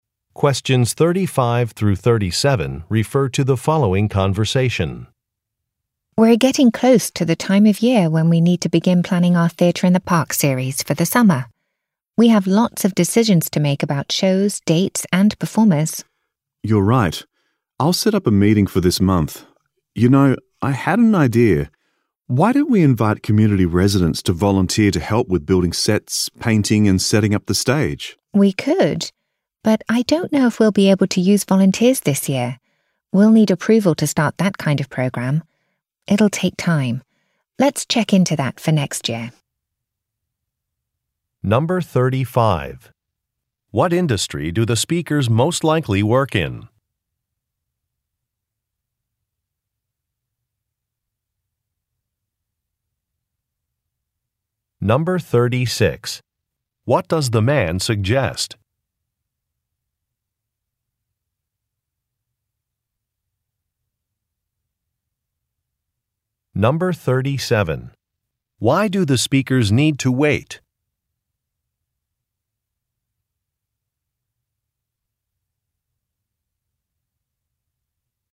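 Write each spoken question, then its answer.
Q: What industry do the speakers most likely work in?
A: Theater / entertainment

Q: What does the man suggest?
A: Inviting community residents to volunteer

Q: Why do the speakers need to wait?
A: They need approval to start a volunteer program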